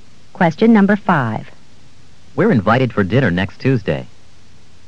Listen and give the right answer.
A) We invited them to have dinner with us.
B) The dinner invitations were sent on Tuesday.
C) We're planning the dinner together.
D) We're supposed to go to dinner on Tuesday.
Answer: D) We're supposed to go to dinner on Tuesday.

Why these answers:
We're invited for dinner next Tuesday.